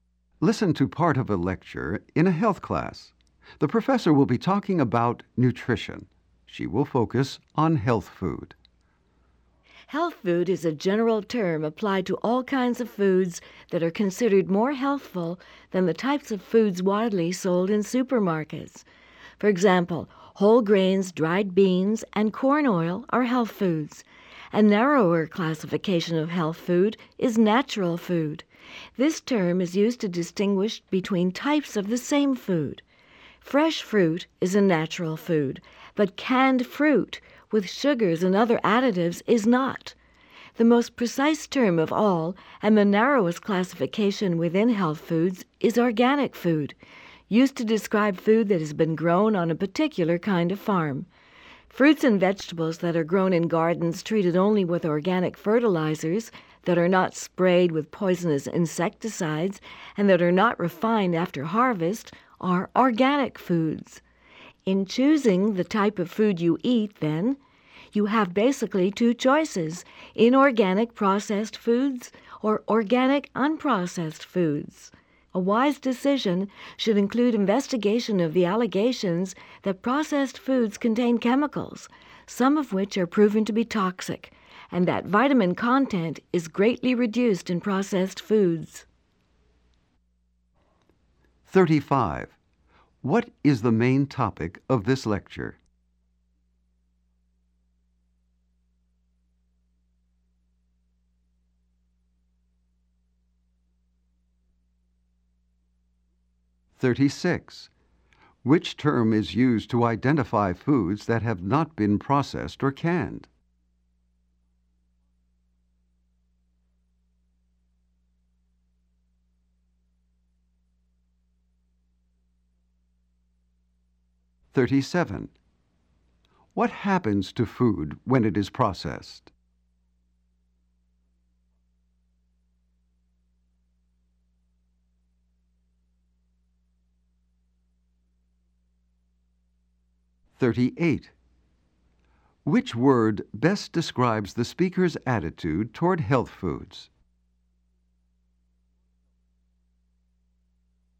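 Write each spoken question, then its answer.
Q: What is the main topic of this lecture?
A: Health food

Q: What happens to food when it is processed?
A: Vitamin content is reduced and chemicals may be added.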